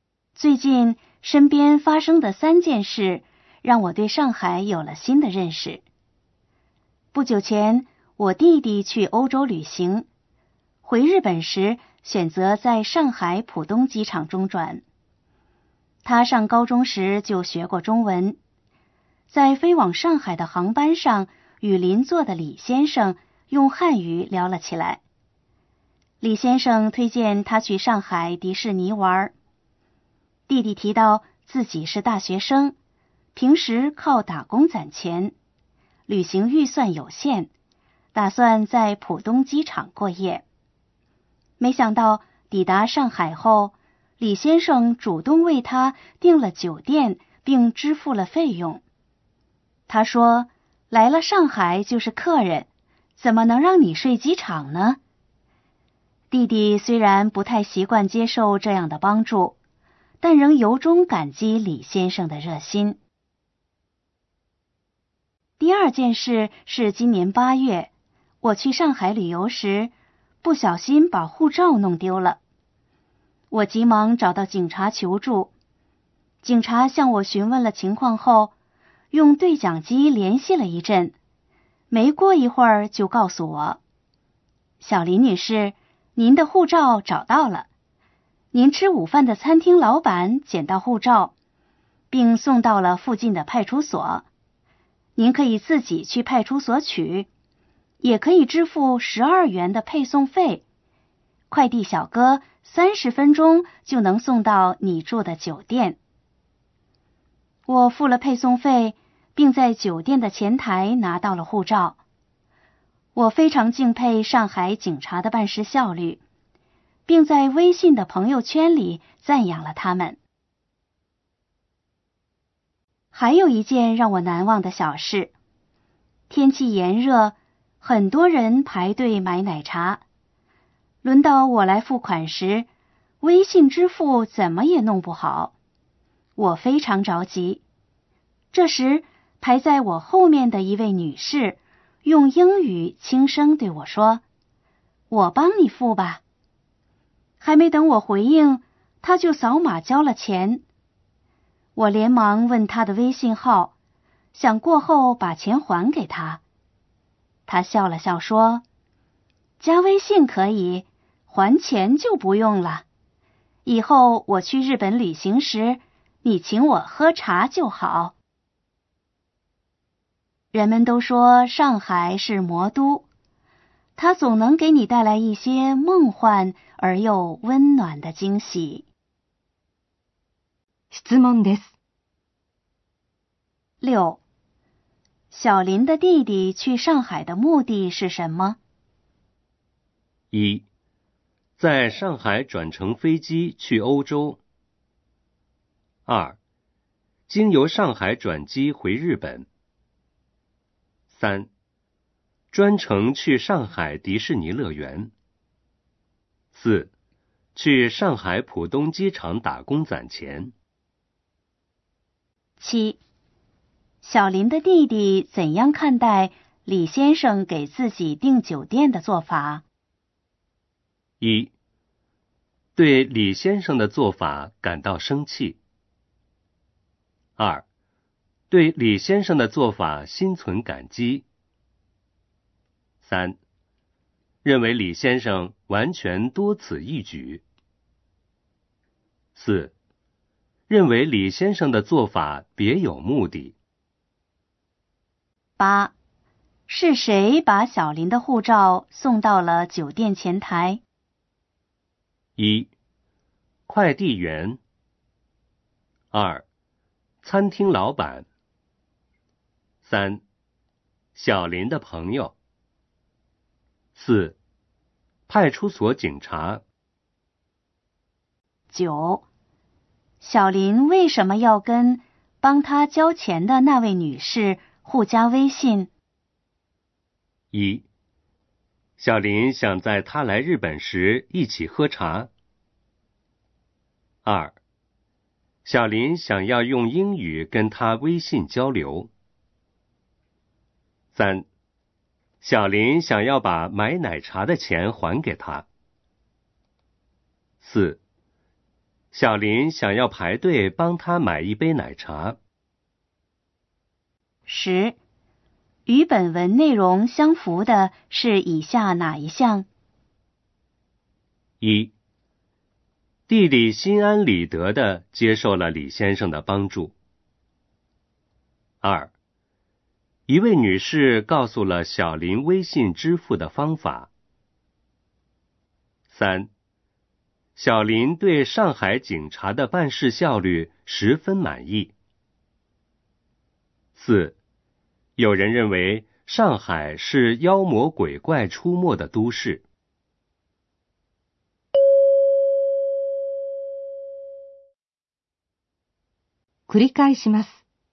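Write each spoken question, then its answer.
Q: 小林的弟弟去上海的目的是什么?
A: 2: 经由上海转机回日本

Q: 小林的弟弟怎样看待李先生给自己订酒店的做法?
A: 2: 对李先生的做法心存感激

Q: 是谁把小林的护照送到了酒店前台?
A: 1: 快递员

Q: 小林为什么要跟帮他交钱的那位女士互加微信?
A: 3: 小林想要把买奶茶的钱还给他

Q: 与本文内容相符的是以下哪一项?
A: 3: 小林对上海警察的办事效率十分满意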